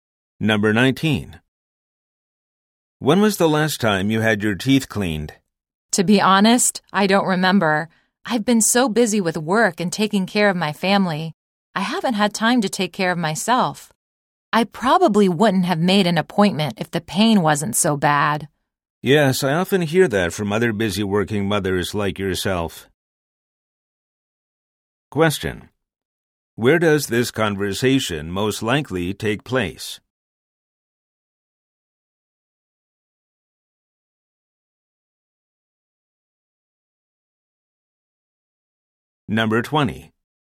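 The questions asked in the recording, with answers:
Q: Where does this conversation most likely take place?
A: At a dentist's office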